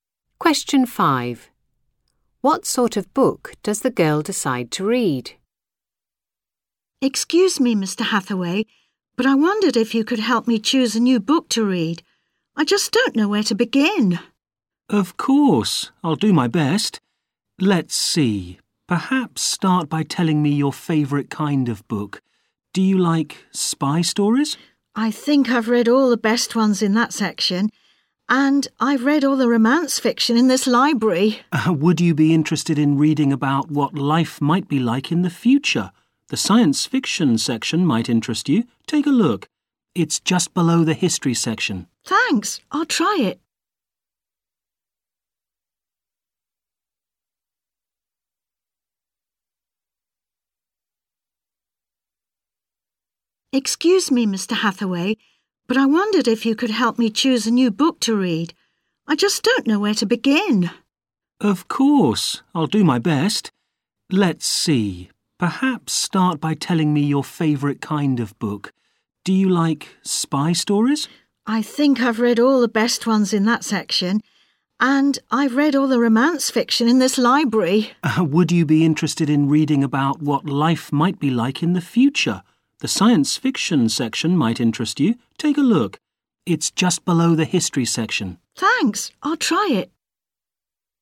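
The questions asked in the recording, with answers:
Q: What sort of book does the girl decide to read?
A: science fiction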